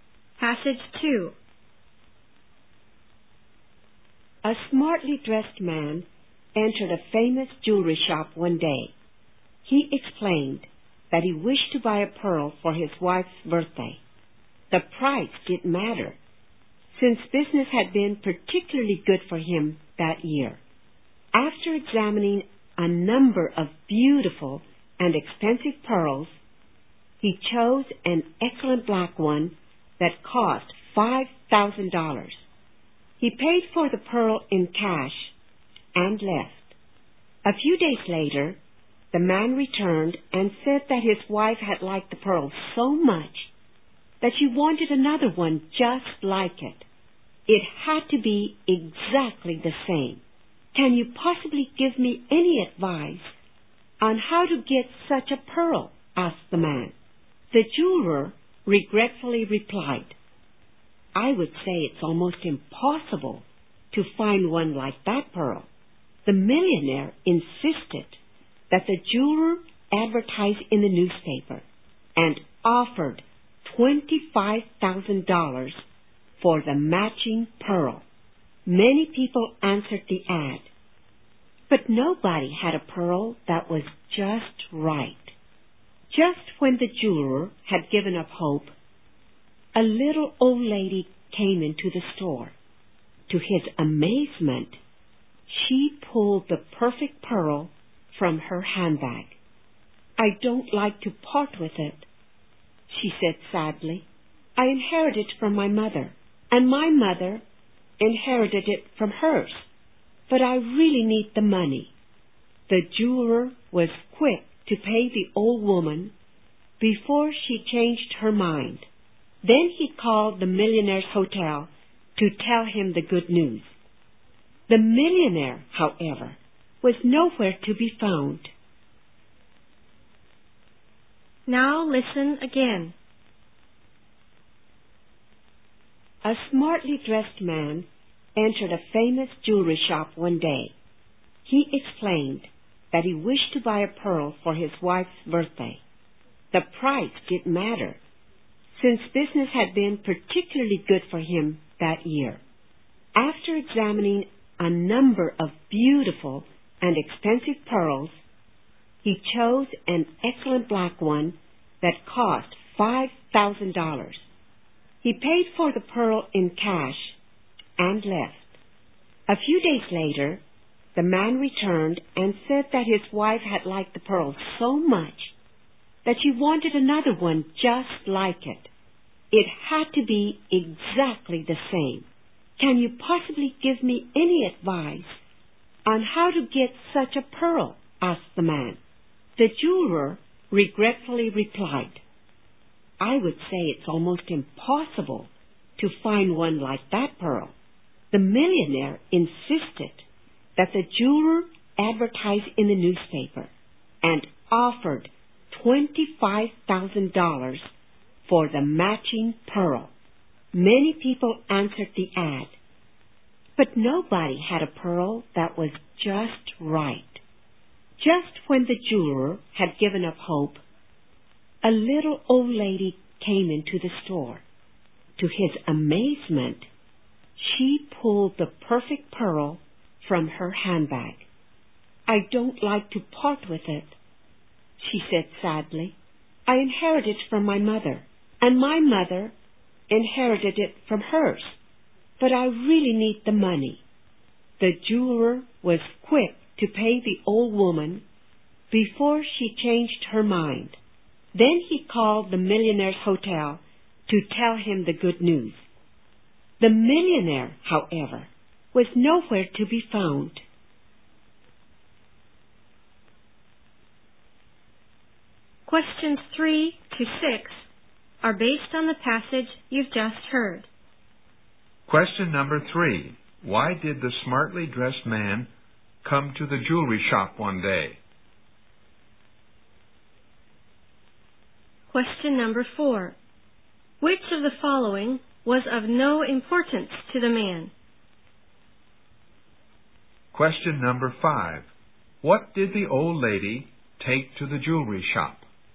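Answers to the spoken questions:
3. To buy a pearl for his wife's birthday
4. The price
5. A black pearl exactly like the one the man bought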